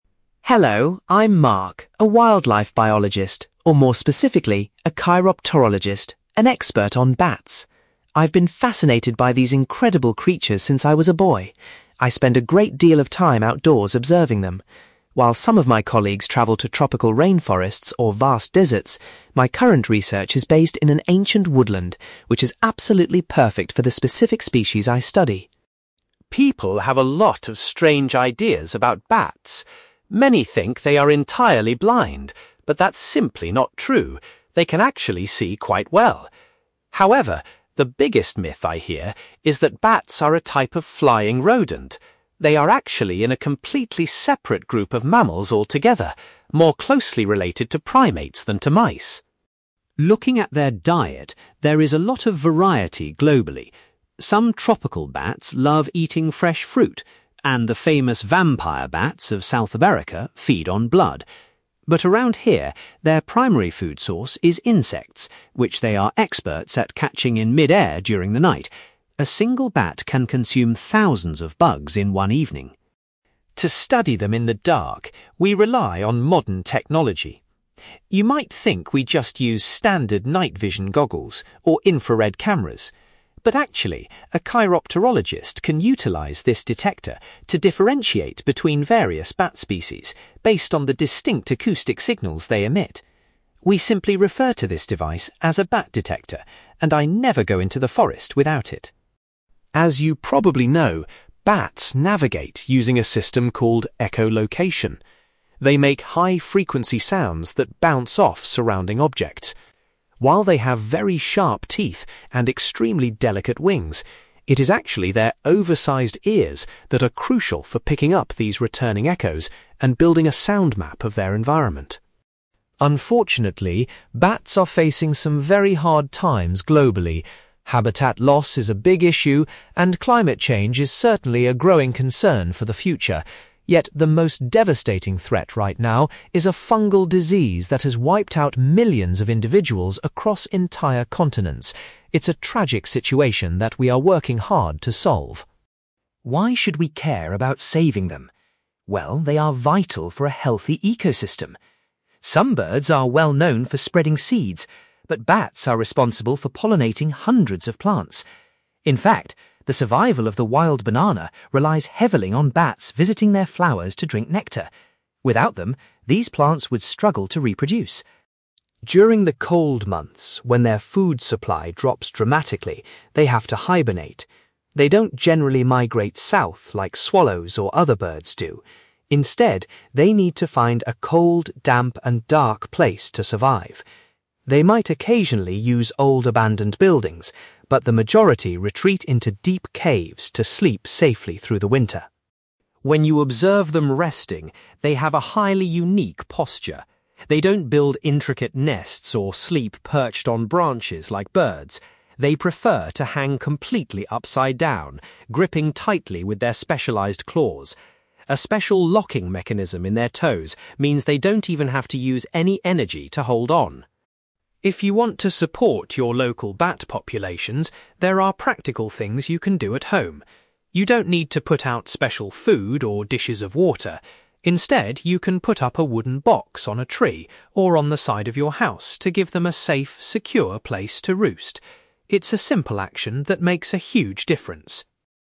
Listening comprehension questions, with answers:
You will hear a wildlife biologist called Mark giving a talk about his work with bats. For questions 9-18, complete the sentences with a word or short phrase.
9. Mark is currently conducting his research in an old (9)........................... .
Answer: woodland

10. Mark says that it is a common misconception to believe that bats are a kind of (10)........................... .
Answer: rodent

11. The bats living in Mark's study area mainly eat (11)........................... .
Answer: insects

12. Mark explains that scientists use a device called a (12)........................... to identify different species.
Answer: bat detector

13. Mark points out that bats rely on their large (13)........................... to interpret the echoes they hear.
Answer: ears

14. According to Mark, a widespread (14)........................... is currently causing the greatest harm to bat populations.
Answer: disease

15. Mark highlights that plants like the wild (15)........................... depend on bats for pollination.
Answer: banana

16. During the winter months, most of the bats hibernate inside (16)........................... .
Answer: caves

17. While resting, bats use their (17)........................... to hold onto surfaces while hanging upside down.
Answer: claws

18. Mark suggests that people can help bats by attaching a (18)........................... to a tree or wall.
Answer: wooden box

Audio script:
Mark: Hello, I'm Mark, a wildlife biologist, or more specifically, a chiropterologist—an expert on bats. I've been fascinated by these incredible creatures since I was a boy. I spend a great deal of time outdoors observing them. While some of my colleagues travel to tropical rainforests or vast deserts, my current research is based in an ancient woodland, which is absolutely perfect for the specific species I study.
People have a lot of strange ideas about bats. Many think they are entirely blind, but that's simply not true—they can actually see quite well. However, the biggest myth I hear is that bats are a type of flying rodent. They are actually in a completely separate group of mammals altogether, more closely related to primates than to mice.
Looking at their diet, there is a lot of variety globally. Some tropical bats love eating fresh fruit, and the famous vampire bats of South America feed on blood. But around here, their primary food source is insects, which they are experts at catching in mid-air during the night. A single bat can consume thousands of bugs in one evening.
To study them in the dark, we rely on modern technology. You might think we just use standard night-vision goggles or infrared cameras. But actually, a chiropterologist can utilize this detector to differentiate between various bat species based on the distinct acoustic signals they emit. We simply refer to this device as a bat detector, and I never go into the forest without it.
As you probably know, bats navigate using a system called echolocation. They make high-frequency sounds that bounce off surrounding objects. While they have very sharp teeth and extremely delicate wings, it is actually their oversized ears that are crucial for picking up these returning echoes and building a sound-map of their environment.
Unfortunately, bats are facing some very hard times globally. Habitat loss is a big issue, and climate change is certainly a growing concern for the future. Yet, the most devastating threat right now is a fungal disease that has wiped out millions of individuals across entire continents. It's a tragic situation that we are working hard to solve.
Why should we care about saving them? Well, they are vital for a healthy ecosystem. Some birds are well known for spreading seeds, but bats are responsible for pollinating hundreds of plants. In fact, the survival of the wild banana relies heavily on bats visiting their flowers to drink nectar. Without them, these plants would struggle to reproduce.
During the cold months, when their food supply drops dramatically, they have to hibernate. They don't generally migrate south like swallows or other birds do. Instead, they need to find a cold, damp, and dark place to survive. They might occasionally use old abandoned buildings, but the majority retreat into deep caves to sleep safely through the winter.
When you observe them resting, they have a highly unique posture. They don't build intricate nests or sleep perched on branches like birds. They prefer to hang completely upside down, gripping tightly with their specialized claws. A special locking mechanism in their toes means they don't even have to use any energy to hold on.
If you want to support your local bat populations, there are practical things you can do at home. You don't need to put out special food or dishes of water. Instead, you can put up a wooden box on a tree or on the side of your house to give them a safe, secure place to roost. It's a simple action that makes a huge difference.

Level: B2